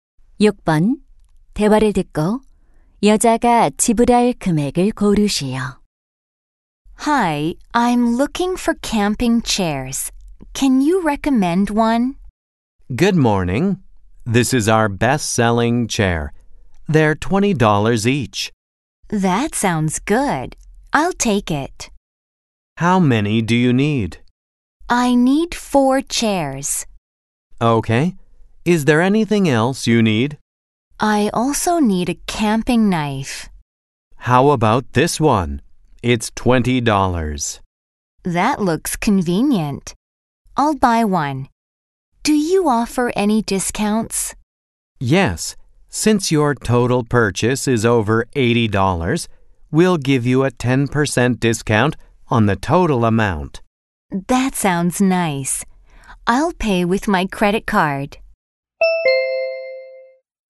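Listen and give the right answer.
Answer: 90달러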